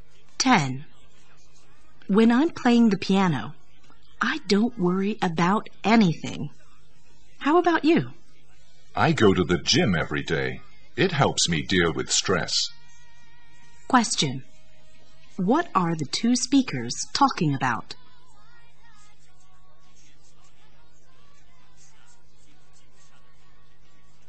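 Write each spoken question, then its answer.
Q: What are the 2 speakers talking about?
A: Ways of dealing with stress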